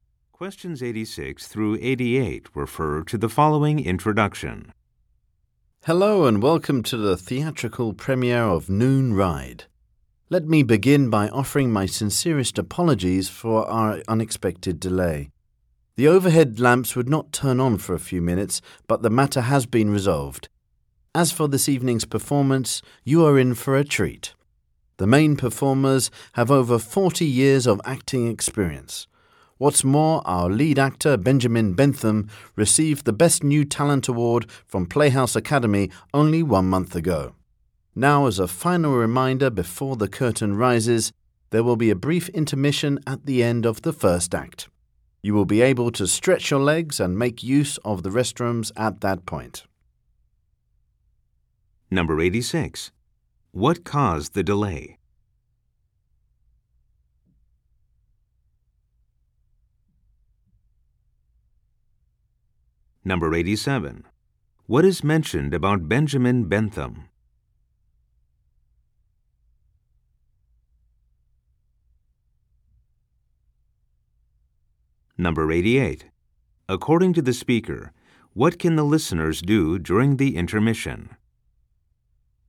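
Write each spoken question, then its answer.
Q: What caused the delay?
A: The overhead lamps would not turn on

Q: What is mentioned about Benjamin Bentham?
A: He recently won an award

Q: According to the speaker, what can the listeners do during the intermission?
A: Stretch their legs and use the restrooms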